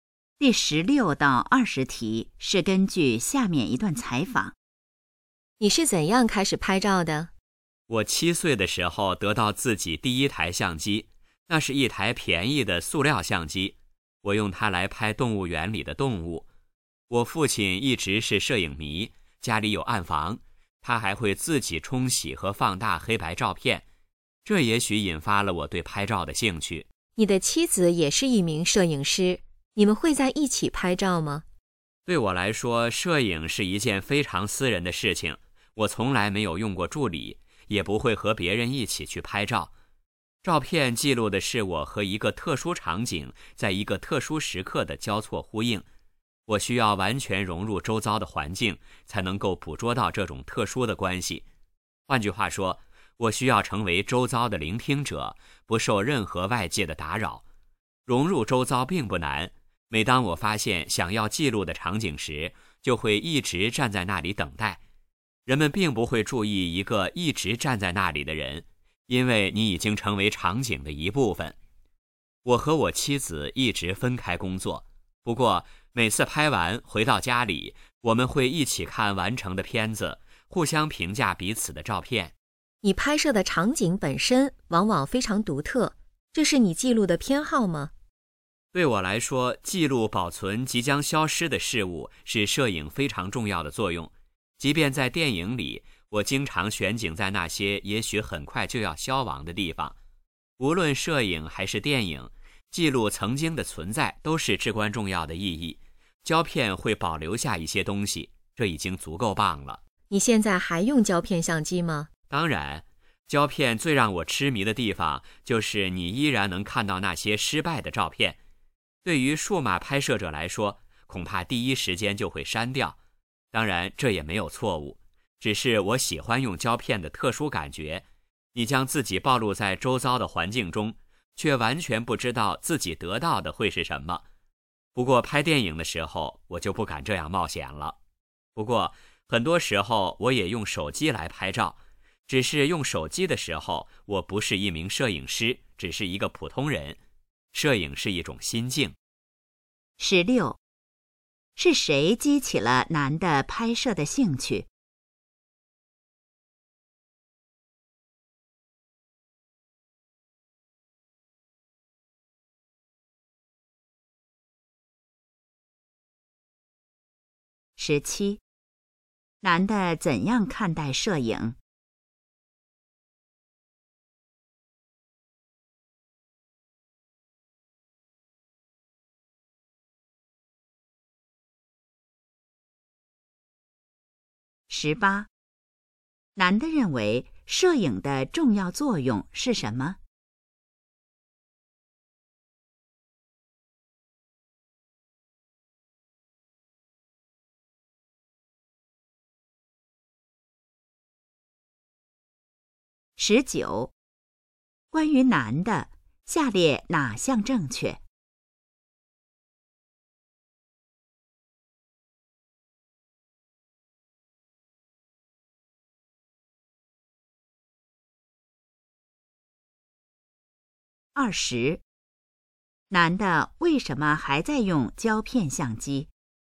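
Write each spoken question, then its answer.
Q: 是谁激起了男的拍摄的兴趣?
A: 他的父亲

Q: 男的认为摄影的重要作用是什么?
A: 记录保存即将消失的事物

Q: 男的为什么还在用胶片相机?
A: 喜欢胶片的特殊感觉,能看到失败的照片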